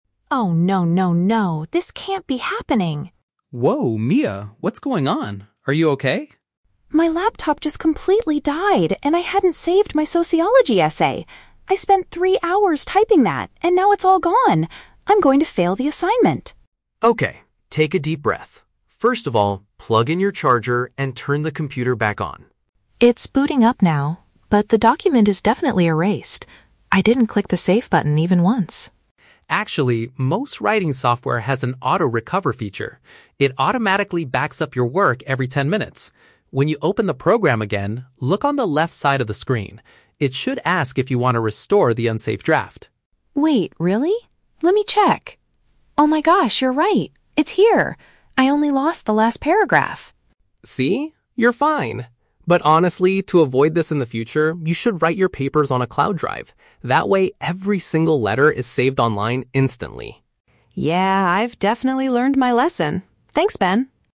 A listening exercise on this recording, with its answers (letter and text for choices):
Listen to the conversation between two classmates and choose the correct answer (A, B, or C) for each question.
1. Why is Mia extremely upset at the beginning of the conversation?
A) She is going to fail her sociology assignment because she missed the deadline.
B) Her device shut down and she lost her unsaved academic paper.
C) She accidentally spilled coffee on her laptop and broke the battery.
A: B) Her device shut down and she lost her unsaved academic paper.

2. How does Ben suggest Mia can find her missing work?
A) By clicking the main save button immediately after restarting the laptop.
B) By looking for a hidden recovery folder on her computer's desktop.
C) By utilizing a built-in tool that automatically saves temporary copies.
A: C) By utilizing a built-in tool that automatically saves temporary copies.

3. What is Ben's advice for Mia to prevent this issue from happening again?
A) She should use an internet-based storage system for her future writing.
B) She needs to buy a new charger to keep her laptop battery full.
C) She ought to print out her essay every time she finishes a paragraph.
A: A) She should use an internet-based storage system for her future writing.

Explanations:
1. Mia says, "My laptop just completely died, and I hadn't saved my sociology essay!" Option B perfectly paraphrases "laptop died" as "device shut down" and "sociology essay" as "academic paper." Option A is a trap; she mentions she is "going to fail the assignment," but the reason is the lost file, not a missed deadline. Option C is a plausible reason for a broken laptop, but coffee is never mentioned in the audio.
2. Ben explains that the software has an "auto-recover feature" that "automatically backs up your work." Option C paraphrases this accurately as a "built-in tool that automatically saves temporary copies." Option A is a trap; the "save button" is mentioned, but Mia says she "didn't click the save button even once." Option B is a plausible technical step, but Ben tells her to look "on the left side of the screen" inside the program, not on the desktop.
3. Ben advises her to "write your papers on a cloud drive" so they are "saved online instantly." Option A perfectly paraphrases this as using an "internet-based storage system." Option B is a trap; Ben tells her to "plug in your charger" at the beginning to turn the computer on, but it is not his advice for the future. Option C is a plausible study habit but is not mentioned at all.

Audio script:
Mia: Oh no, no, no! This can't be happening!
Ben: Whoa, Mia, what's going on? Are you okay?
Mia: My laptop just completely died, and I hadn't saved my sociology essay! I spent three hours typing that, and now it's all gone. I'm going to fail the assignment.
Ben: Okay, take a deep breath. First of all, plug in your charger and turn the computer back on.
Mia: It's booting up now... but the document is definitely erased. I didn't click the save button even once.
Ben: Actually, most writing software has an auto-recover feature. It automatically backs up your work every ten minutes. When you open the program again, look on the left side of the screen. It should ask if you want to restore the unsaved draft.
Mia: Wait, really? Let me check... Oh my gosh, you're right! It's here! I only lost the last paragraph.
Ben: See? You're fine. But honestly, to avoid this in the future, you should write your papers on a cloud drive. That way, every single letter is saved online instantly.